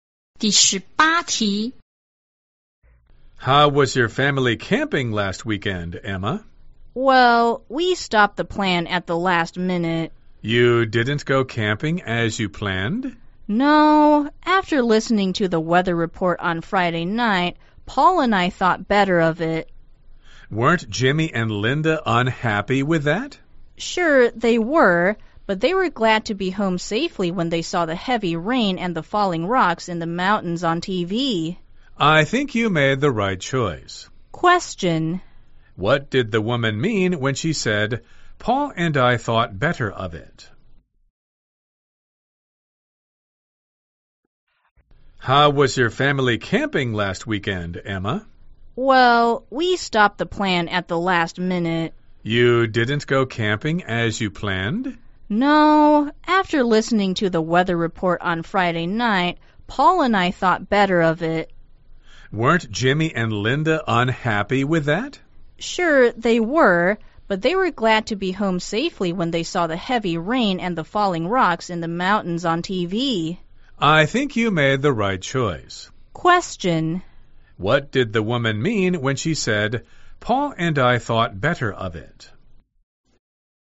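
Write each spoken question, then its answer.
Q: What did the woman mean when she said, Paul and I thought better of it?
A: They decided not to go camping.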